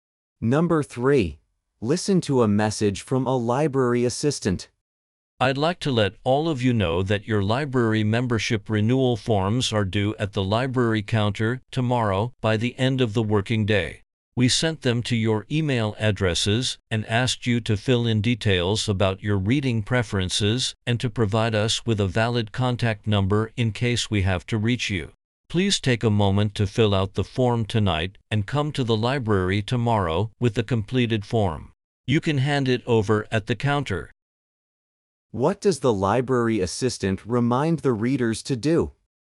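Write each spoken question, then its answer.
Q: What does the library assistant remind the readers to do?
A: Fill out the membership renewal form and hand it in at the counter tomorrow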